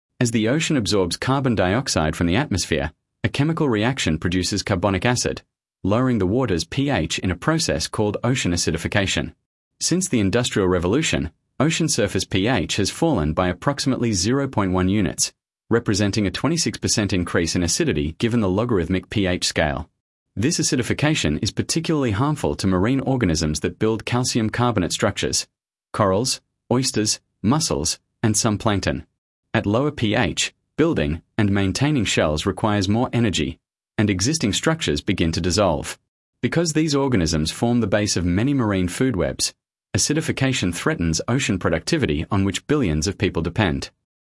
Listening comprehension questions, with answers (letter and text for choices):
Select the paragraph that best summarises the recording.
Sample Text 1 — Ocean Acidification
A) A. Ocean acidification is caused entirely by agricultural runoff entering coastal waterways, not by atmospheric carbon dioxide.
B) B. As oceans absorb carbon dioxide from the atmosphere, their acidity increases, threatening marine organisms that build calcium carbonate structures and the food webs that depend on them.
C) C. Ocean acidification has reached a level that has already caused the extinction of the majority of coral species.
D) D. The oceans can absorb unlimited amounts of carbon dioxide because their vast volume neutralises the acidity.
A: B) B. As oceans absorb carbon dioxide from the atmosphere, their acidity increases, threatening marine organisms that build calcium carbonate structures and the food webs that depend on them.